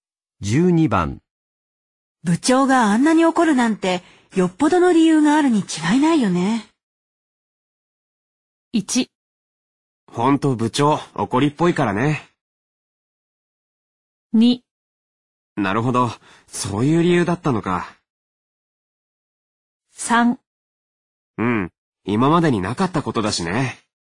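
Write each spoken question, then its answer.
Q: 部長があんなに怒るなんて、よっぽどの理由があるに違いないよね。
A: 3: うん、今までになかったことだしね。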